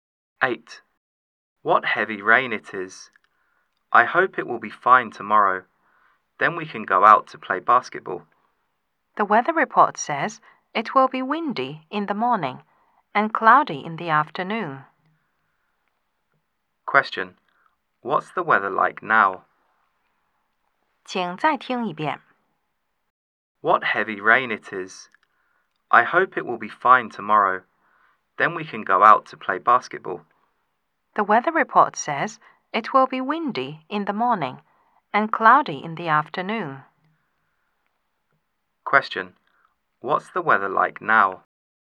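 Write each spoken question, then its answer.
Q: Question. What's the weather like now?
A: It's raining heavily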